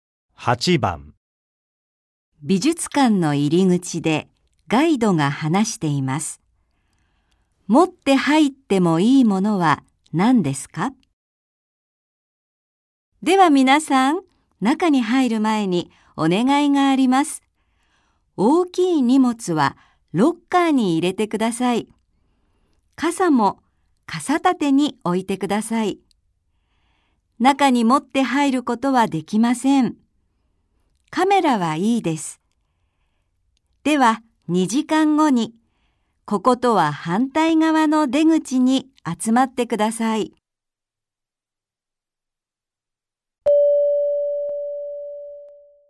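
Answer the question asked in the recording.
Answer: カメラ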